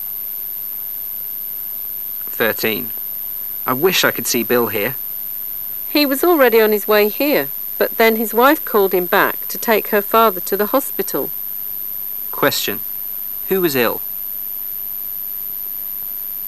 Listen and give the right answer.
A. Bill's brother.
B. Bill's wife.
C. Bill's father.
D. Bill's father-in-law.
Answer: D. Bill's father-in-law.

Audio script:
[解析] M:I wish I could see Bill here! W:He was already on his way here,but then his wife called him back to take her father to the hospital. Q:Who was ill?